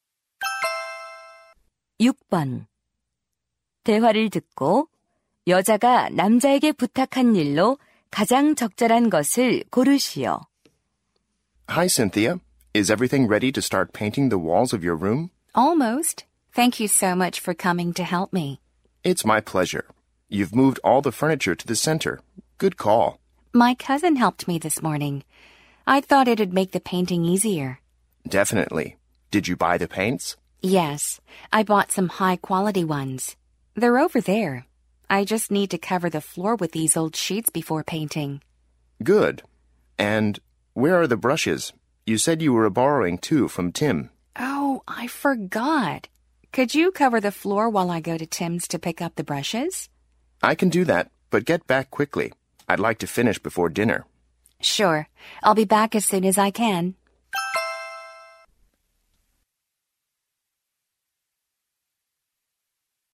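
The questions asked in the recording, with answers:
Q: 대화를 듣고 여자가 남자에게 부탁한 일로 가장 적절한 것을 고르시오.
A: 바닥을 헌 시트로 덮기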